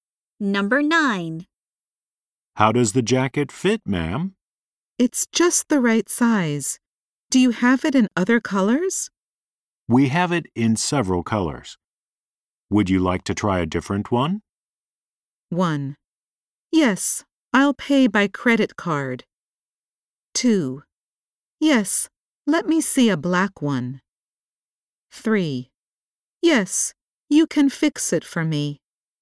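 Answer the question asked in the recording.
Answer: 2: Yes, let me see a black one.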